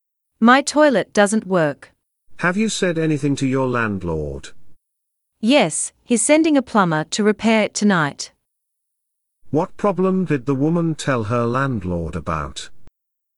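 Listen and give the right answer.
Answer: Her toilet doesn't work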